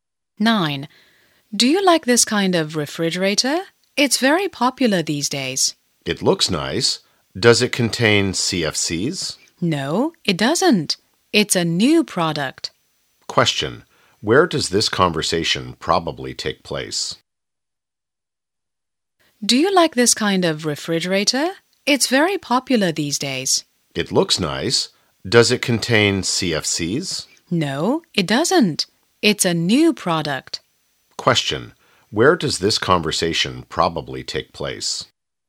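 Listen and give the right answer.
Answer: In a shop (electrical appliance store)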